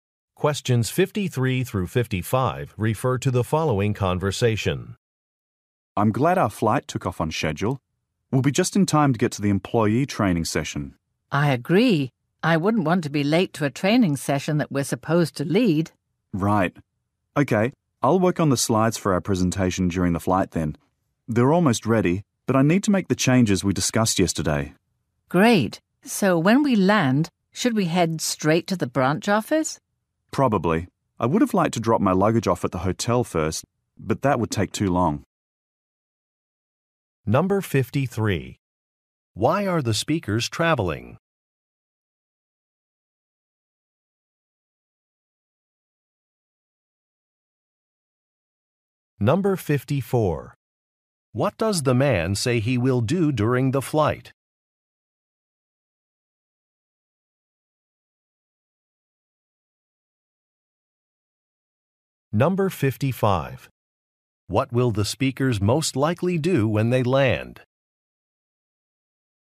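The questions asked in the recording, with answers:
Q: Why are the speakers traveling?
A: To lead an employee training session

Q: What does the man say he will do during the flight?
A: Work on presentation slides

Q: What will the speakers most likely do when they land?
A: Go straight to the branch office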